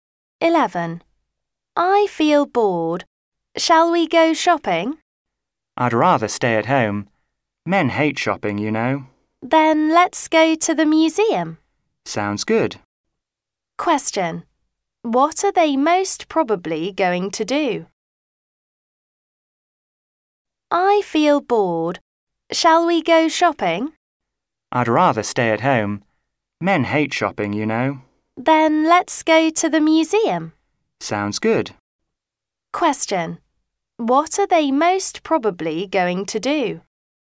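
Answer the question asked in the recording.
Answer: Go to the museum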